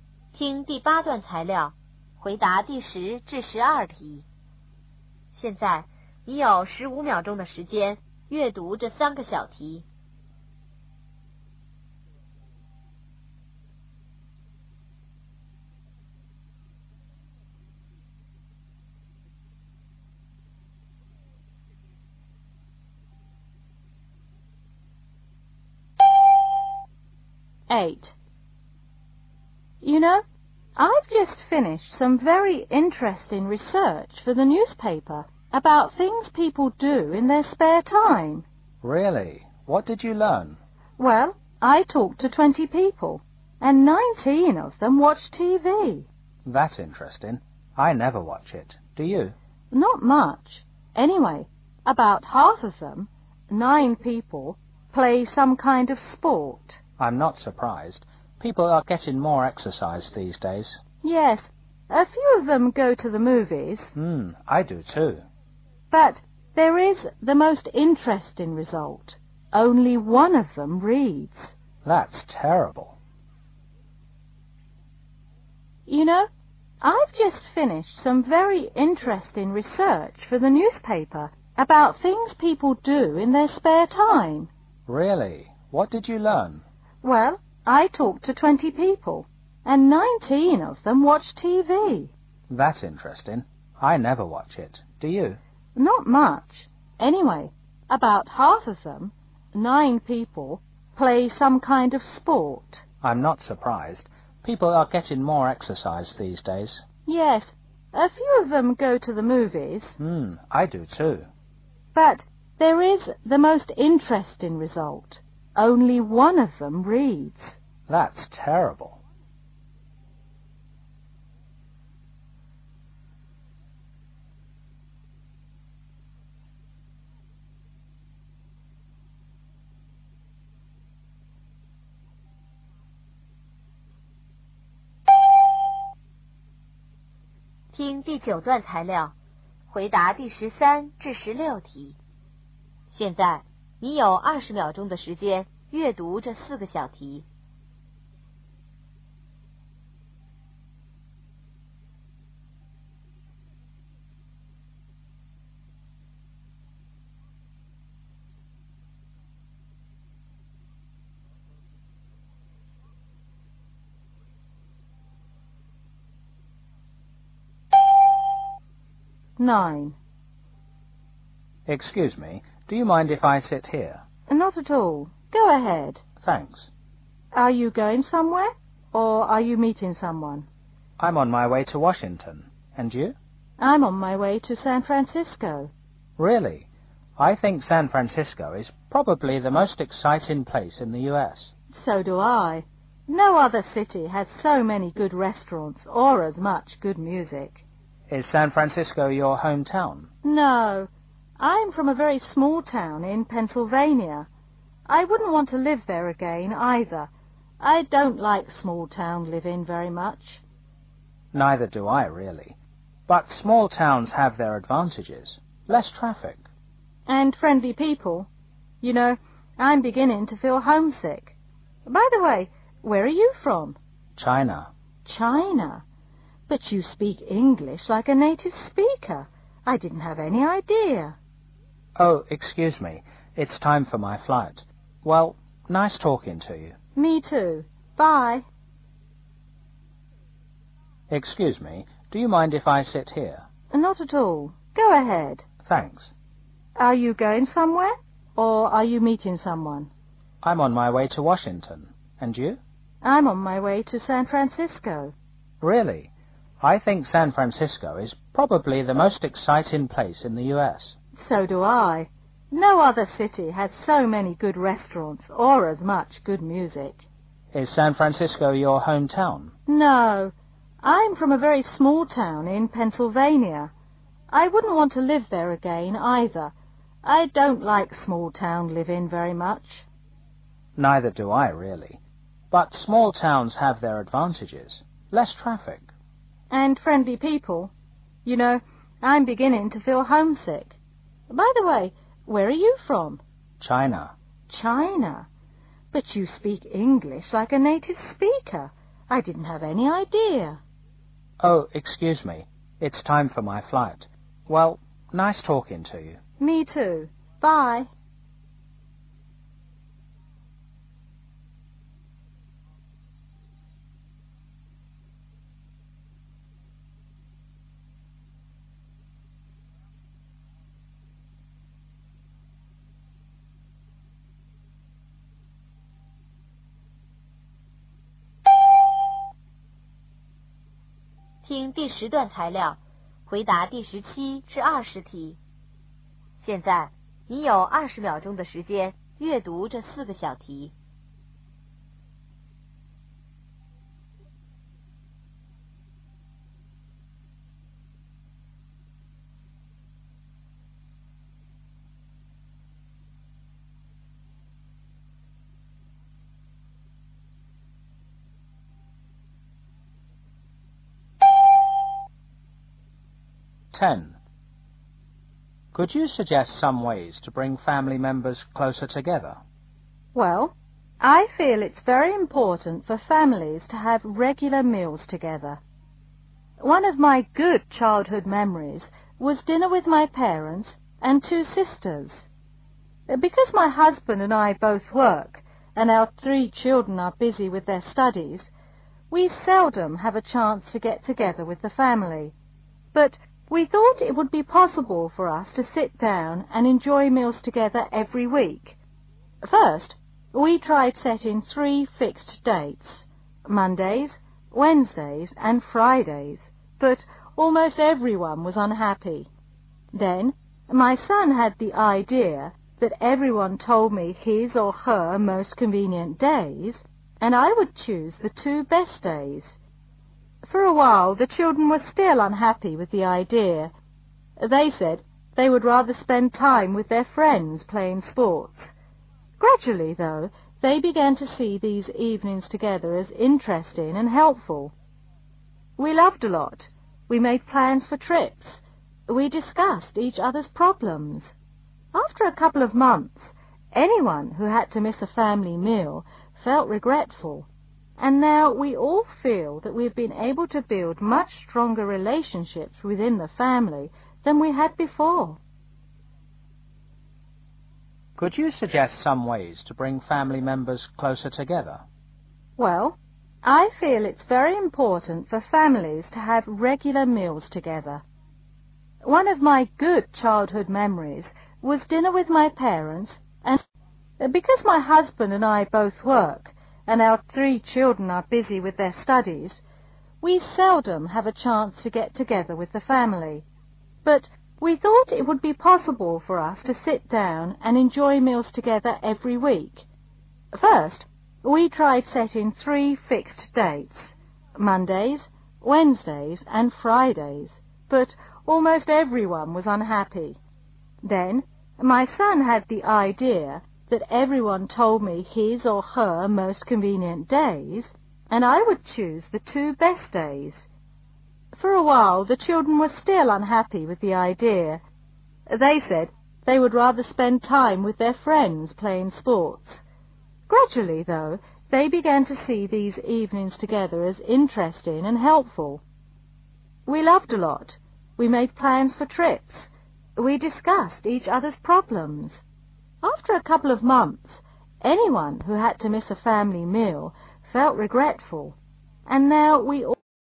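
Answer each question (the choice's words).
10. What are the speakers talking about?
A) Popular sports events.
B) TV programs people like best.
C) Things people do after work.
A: Things people do after work.

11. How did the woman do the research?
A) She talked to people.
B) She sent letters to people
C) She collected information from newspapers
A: She talked to people.

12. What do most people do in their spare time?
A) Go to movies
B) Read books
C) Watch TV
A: Watch TV

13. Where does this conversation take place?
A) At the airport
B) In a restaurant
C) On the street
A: At the airport

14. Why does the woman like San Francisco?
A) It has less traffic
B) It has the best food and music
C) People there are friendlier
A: It has the best food and music

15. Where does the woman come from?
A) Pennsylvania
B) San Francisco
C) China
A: Pennsylvania

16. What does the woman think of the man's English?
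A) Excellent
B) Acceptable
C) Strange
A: Excellent

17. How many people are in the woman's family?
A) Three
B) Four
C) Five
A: Five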